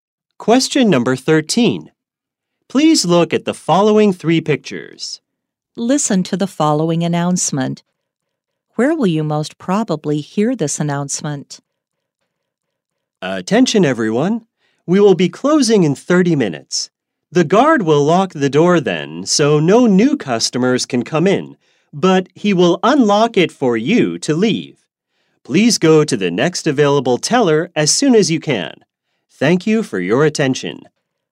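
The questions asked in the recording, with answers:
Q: Where will you most probably hear this announcement?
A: At a bank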